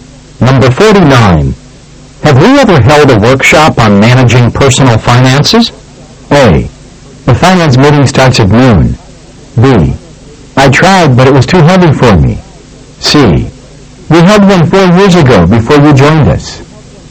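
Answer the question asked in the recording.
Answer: C: We had one 4 years ago before you joined us.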